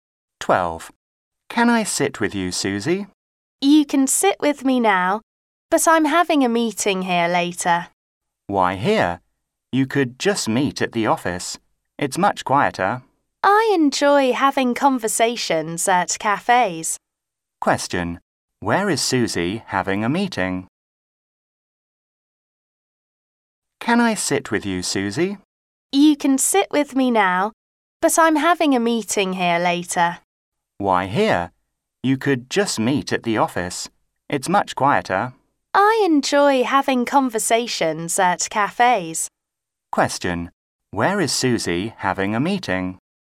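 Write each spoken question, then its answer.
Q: Where is Susie having a meeting?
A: At a cafe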